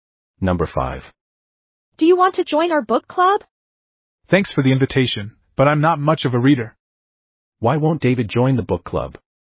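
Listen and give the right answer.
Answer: He is not much of a reader.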